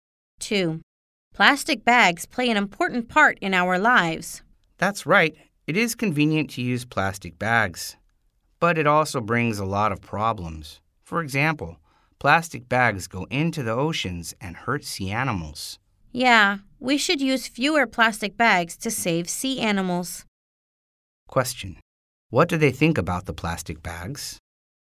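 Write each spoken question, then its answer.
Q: What do they think about the plastic bags?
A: They are convenient but cause problems, so we should use fewer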